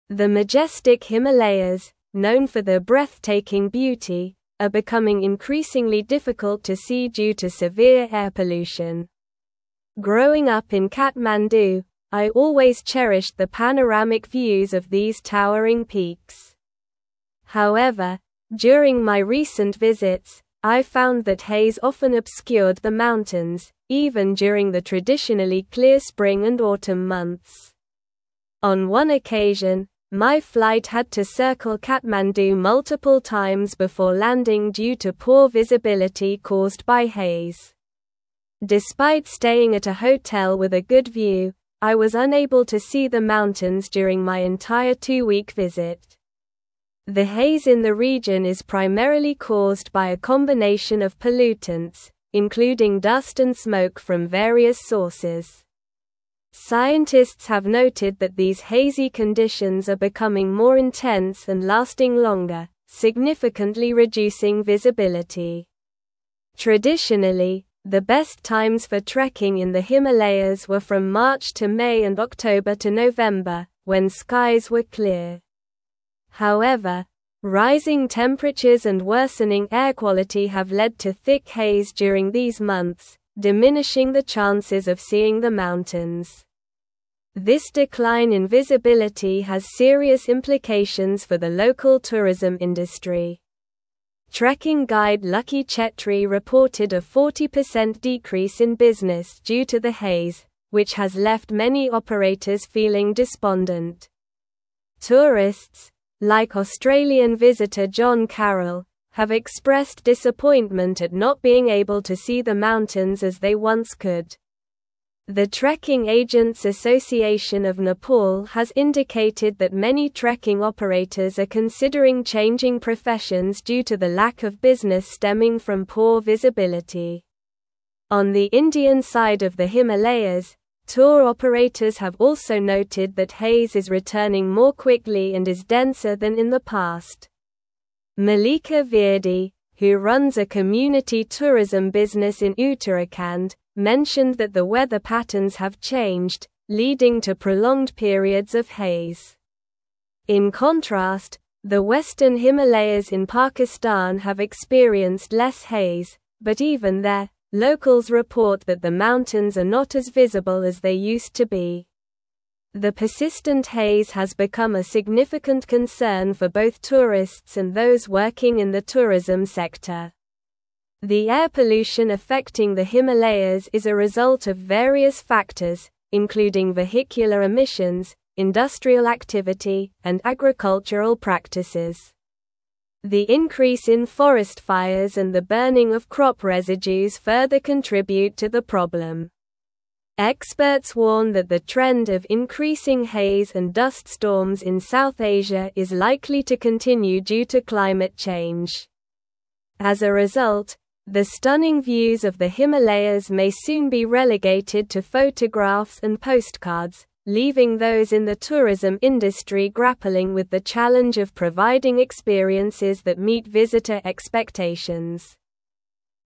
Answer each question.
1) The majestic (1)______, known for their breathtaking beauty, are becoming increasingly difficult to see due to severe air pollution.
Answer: Himalayas

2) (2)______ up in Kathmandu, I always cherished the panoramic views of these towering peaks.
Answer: Growing

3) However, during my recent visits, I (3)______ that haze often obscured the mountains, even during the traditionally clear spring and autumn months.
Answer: found

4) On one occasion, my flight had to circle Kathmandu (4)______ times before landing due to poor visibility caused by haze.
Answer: multiple

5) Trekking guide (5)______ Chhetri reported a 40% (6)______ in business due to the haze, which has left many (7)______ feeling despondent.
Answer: Lucky

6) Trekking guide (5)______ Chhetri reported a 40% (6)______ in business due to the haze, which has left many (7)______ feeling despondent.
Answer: decrease

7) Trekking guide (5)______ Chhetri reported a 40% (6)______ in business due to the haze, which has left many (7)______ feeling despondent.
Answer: operators

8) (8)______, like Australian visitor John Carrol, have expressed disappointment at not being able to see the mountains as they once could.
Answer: Tourists

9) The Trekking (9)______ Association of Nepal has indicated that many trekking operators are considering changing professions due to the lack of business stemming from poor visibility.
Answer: Agents

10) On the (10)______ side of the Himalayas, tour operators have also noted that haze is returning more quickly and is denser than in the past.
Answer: Indian

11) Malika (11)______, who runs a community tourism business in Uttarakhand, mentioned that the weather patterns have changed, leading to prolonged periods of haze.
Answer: Virdi

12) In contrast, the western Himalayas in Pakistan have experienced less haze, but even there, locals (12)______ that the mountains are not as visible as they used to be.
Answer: report

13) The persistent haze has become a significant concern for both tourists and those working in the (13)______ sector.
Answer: tourism

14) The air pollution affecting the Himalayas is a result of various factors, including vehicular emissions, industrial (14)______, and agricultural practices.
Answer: activity

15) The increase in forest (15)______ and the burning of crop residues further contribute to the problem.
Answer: fires

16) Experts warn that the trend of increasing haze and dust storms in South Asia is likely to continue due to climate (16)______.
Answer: change

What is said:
The majestic Himalayas, known for their breathtaking beauty, are becoming increasingly difficult to see due to severe air pollution. Growing up in Kathmandu, I always cherished the panoramic views of these towering peaks. However, during my recent visits, I found that haze often obscured the mountains, even during the traditionally clear spring and autumn months. On one occasion, my flight had to circle Kathmandu multiple times before landing due to poor visibility caused by haze. Despite staying at a hotel with a good view, I was unable to see the mountains during my entire two-week visit.
The haze in the region is primarily caused by a combination of pollutants, including dust and smoke from various sources. Scientists have noted that these hazy conditions are becoming more intense and lasting longer, significantly reducing visibility. Traditionally, the best times for trekking in the Himalayas were from March to May and October to November, when skies were clear. However, rising temperatures and worsening air quality have led to thick haze during these months, diminishing the chances of seeing the mountains.
This decline in visibility has serious implications for the local tourism industry. Trekking guide Lucky Chhetri reported a 40% decrease in business due to the haze, which has left many operators feeling despondent. Tourists, like Australian visitor John Carrol, have expressed disappointment at not being able to see the mountains as they once could. The Trekking Agents Association of Nepal has indicated that many trekking operators are considering changing professions due to the lack of business stemming from poor visibility.
On the Indian side of the Himalayas, tour operators have also noted that haze is returning more quickly and is denser than in the past. Malika Virdi, who runs a community tourism business in Uttarakhand, mentioned that the weather patterns have changed, leading to prolonged periods of haze. In contrast, the western Himalayas in Pakistan have experienced less haze, but even there, locals report that the mountains are not as visible as they used to be. The persistent haze has become a significant concern for both tourists and those working in the tourism sector.
The air pollution affecting the Himalayas is a result of various factors, including vehicular emissions, industrial activity, and agricultural practices. The increase in forest fires and the burning of crop residues further contribute to the problem. Experts warn that the trend of increasing haze and dust storms in South Asia is likely to continue due to climate change. As a result, the stunning views of the Himalayas may soon be relegated to photographs and postcards, leaving those in the tourism industry grappling with the challenge of providing experiences that meet visitor expectations.

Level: Level 4